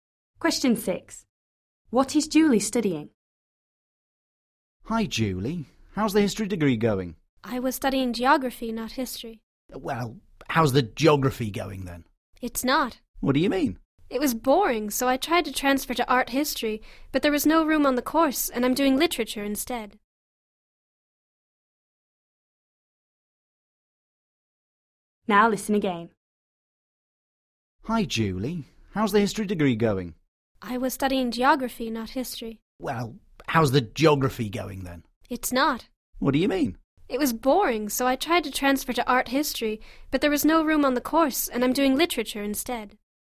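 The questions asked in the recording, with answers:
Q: What is Julie studying?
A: literature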